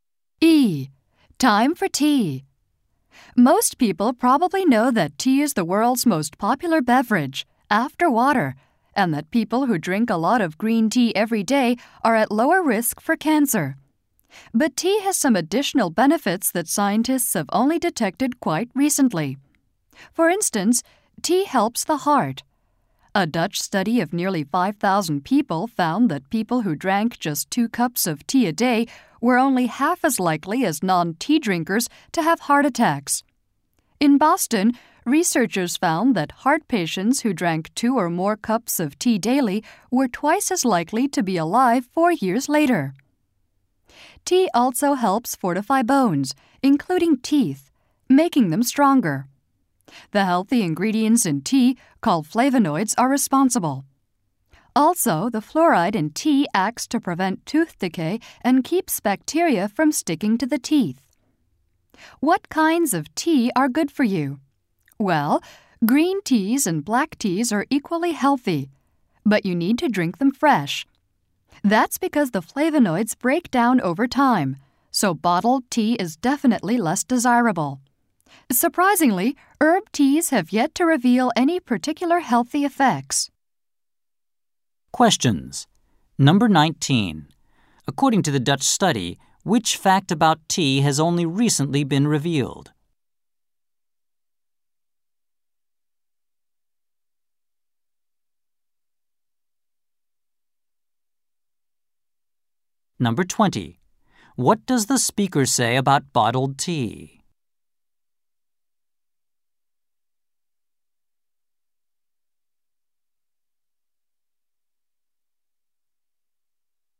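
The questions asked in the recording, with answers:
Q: According to the Dutch study, which fact about tea has only recently been revealed?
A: People who drink two cups of tea a day are only half as likely to have heart attacks.

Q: What does the speaker say about bottled tea?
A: It is less desirable because its flavonoids break down over time.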